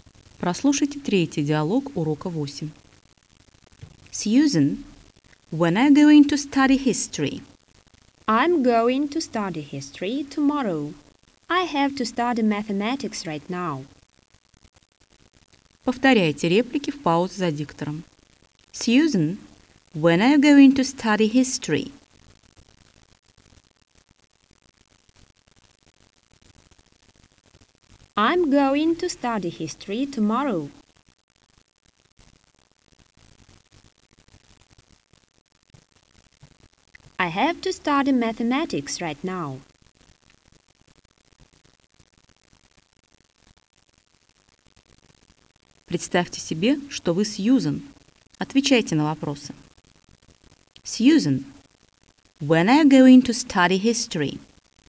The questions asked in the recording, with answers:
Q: Сьюзен, when are you going to study history?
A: I'm going to study history tomorrow.